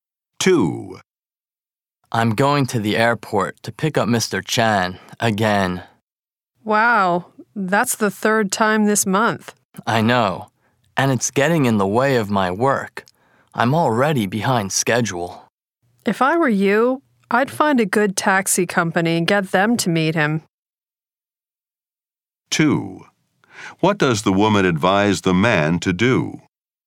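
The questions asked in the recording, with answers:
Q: What does the woman advise the man to do?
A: Hire a taxi company to meet Mr. Chan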